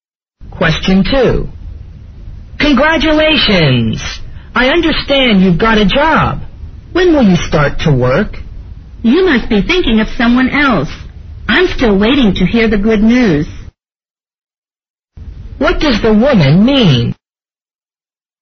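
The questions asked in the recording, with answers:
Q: What does the woman mean?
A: She hasn't got a job yet; the man is thinking of someone else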